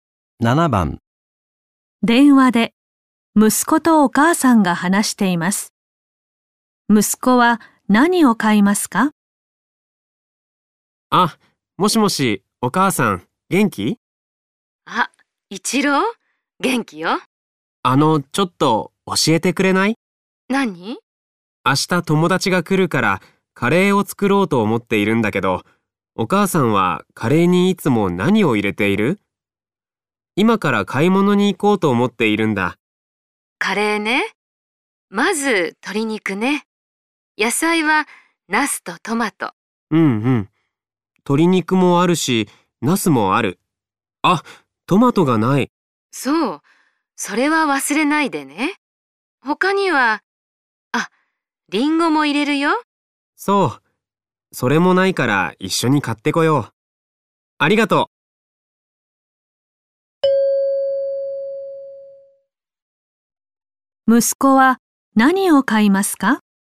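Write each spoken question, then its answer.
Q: 息子は何を買いますか?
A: トマトとリンゴ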